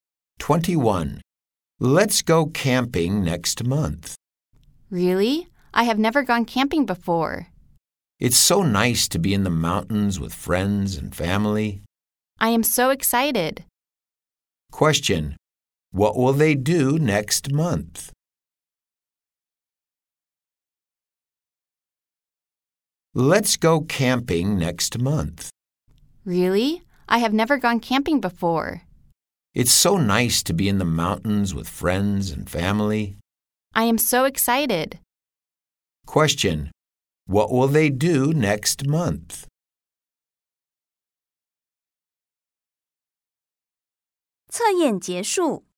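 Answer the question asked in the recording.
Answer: Go camping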